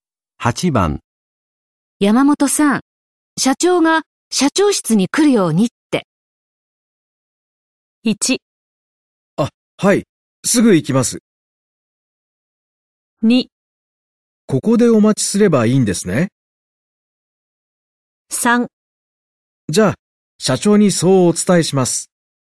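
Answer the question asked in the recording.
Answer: 1: はい、すぐ行きます。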